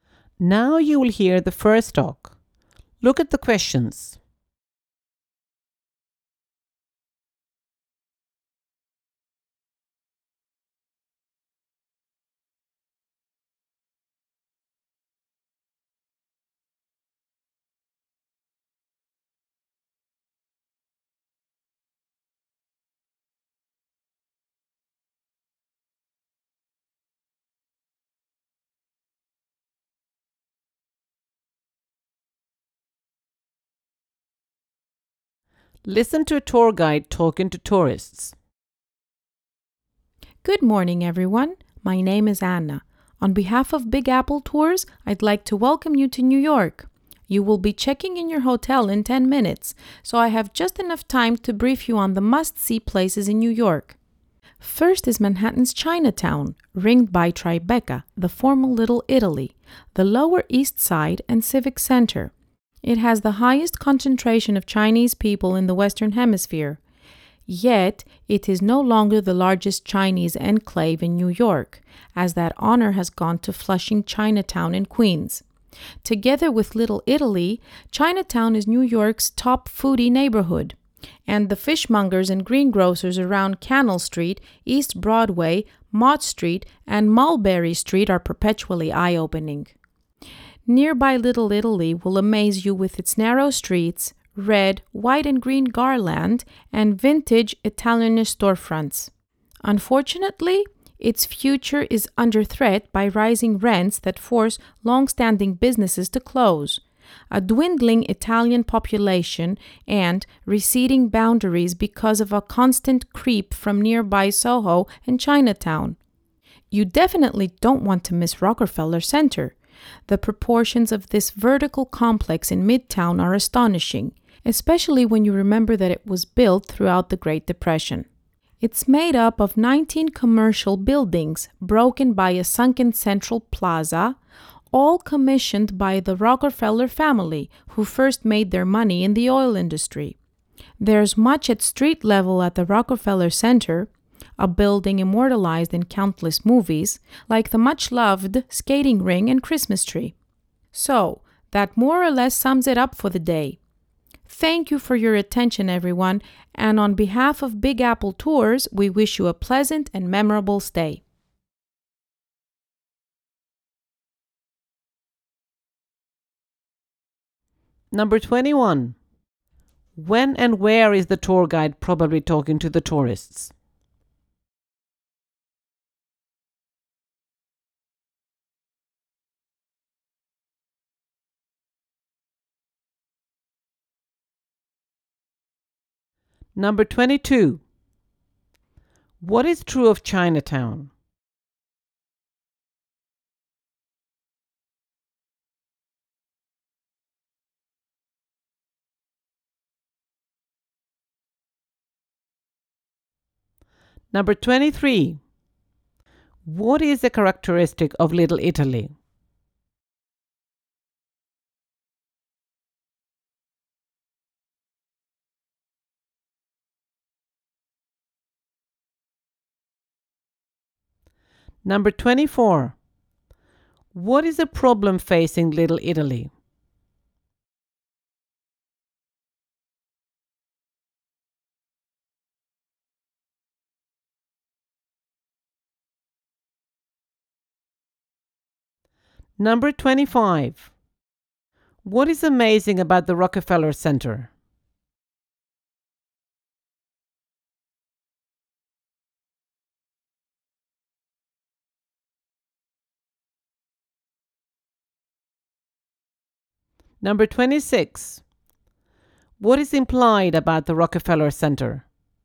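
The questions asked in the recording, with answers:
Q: When and where is the tour guide probably talking to the tourists?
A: In the morning, when they arrive in New York, shortly before checking in to their hotel

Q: What is true of Chinatown?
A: It has the highest concentration of Chinese people in the Western Hemisphere, but it is no longer New York's largest Chinese enclave

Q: What is the characteristic of Little Italy?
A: Narrow streets, red, white and green garland, and vintage Italian-style storefronts

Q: What is the problem facing Little Italy?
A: Rising rents closing businesses, a shrinking Italian population and receding boundaries

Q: What is amazing about the Rockefeller Center?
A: Its astonishing proportions, given that it was built during the Great Depression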